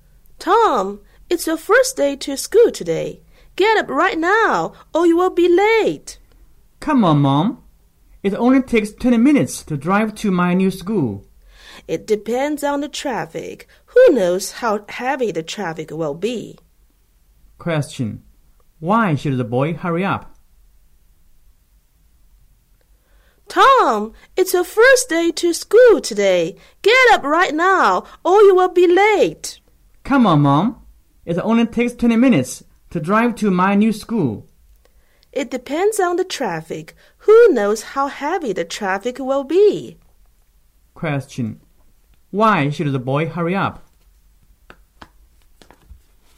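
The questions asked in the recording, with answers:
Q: Why should the boy hurry up?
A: Because the traffic may be heavy and he might be late for school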